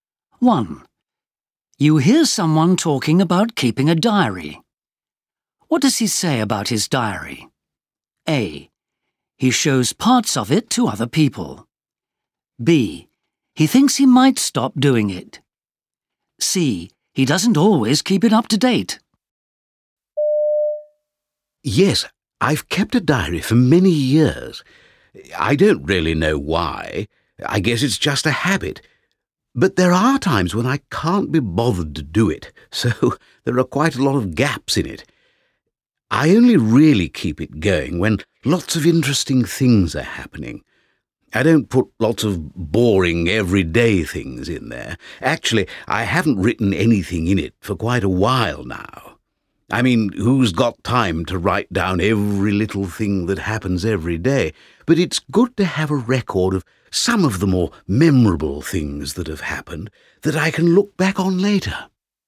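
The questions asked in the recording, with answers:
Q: What does he say about his diary?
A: C: He doesn't always keep it up to date.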